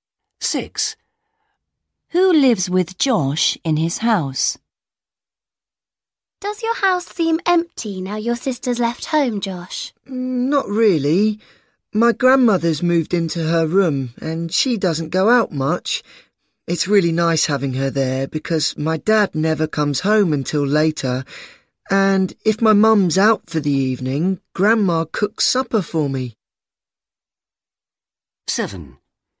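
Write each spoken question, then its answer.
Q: Who lives with Josh in his house?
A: His grandmother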